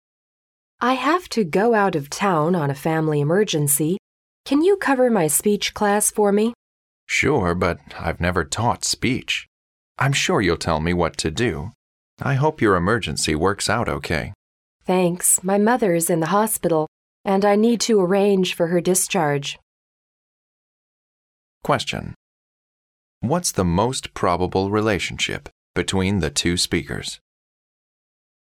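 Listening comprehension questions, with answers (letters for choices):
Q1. What is the most probable relationship between the two speakers?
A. They are colleagues.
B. They are classmates.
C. They are a newly-married couple.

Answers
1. A

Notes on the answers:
根据女士的问话"Can you cover my speech class for me?"可知,两人均是老师,在商量代课(cover a class)的问题。因此两人的关系是同事。

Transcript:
W: I have to go out of town on a family emergency. Can you cover my speech class for me?
M: Sure, but I've never taught speech. I'm sure you'll tell me what to do. I hope your emergency works out okay.
W: Thanks. My mother's in the hospital, and I need to arrange for her discharge.
Question: What is the most probable relationship between the two speakers?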